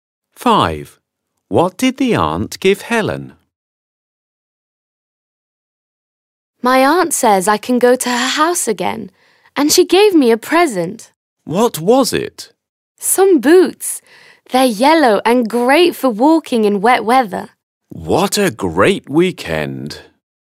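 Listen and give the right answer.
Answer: yellow boots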